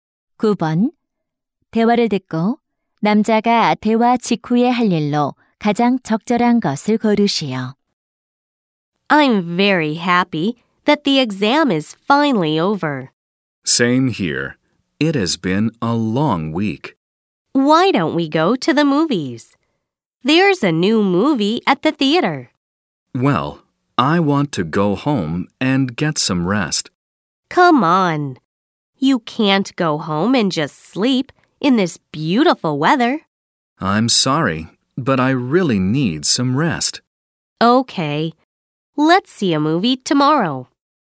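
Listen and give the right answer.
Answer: 집에 가서 쉬기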